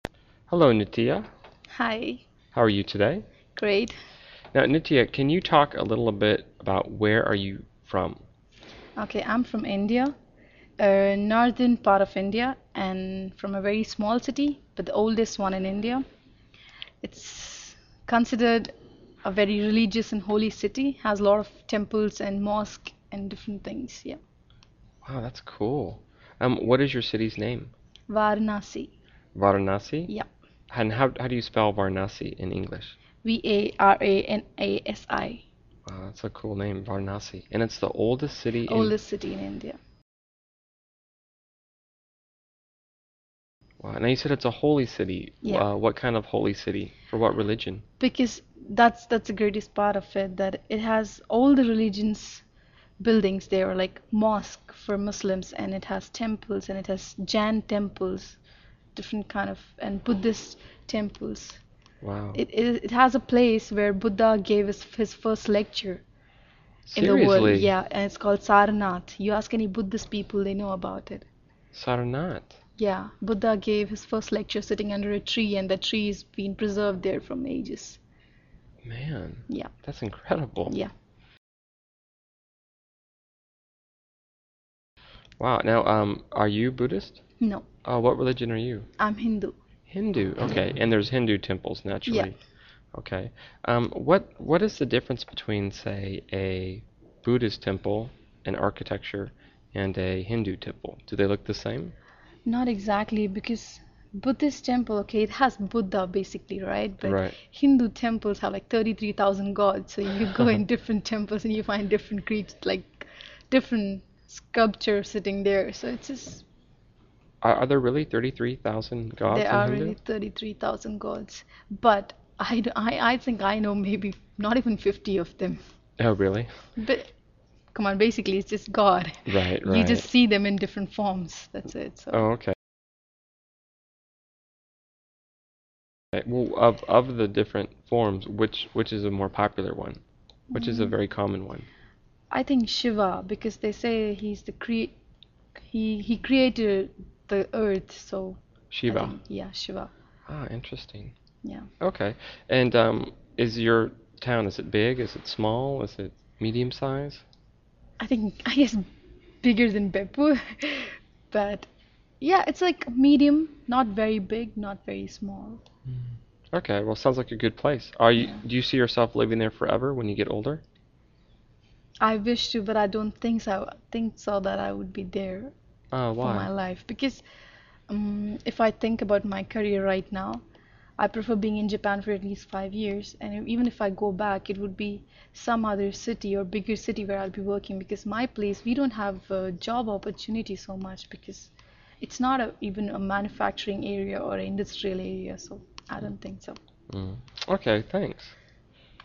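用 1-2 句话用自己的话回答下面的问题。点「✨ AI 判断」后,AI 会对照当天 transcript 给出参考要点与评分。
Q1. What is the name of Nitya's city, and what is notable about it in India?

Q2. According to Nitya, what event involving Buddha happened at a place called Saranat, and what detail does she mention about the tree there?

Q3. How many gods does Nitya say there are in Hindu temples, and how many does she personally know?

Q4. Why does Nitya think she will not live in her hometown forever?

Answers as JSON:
{"1": "Varanasi; it is the oldest city in India and a holy city.", "2": "Buddha gave his first lecture there sitting under a tree; the tree has been preserved for ages.", "3": "33,000 gods; she knows maybe not even 50.", "4": "Because of her career: there are few job opportunities there, as it is not a manufacturing or industrial area."}

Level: CEFRB1-B2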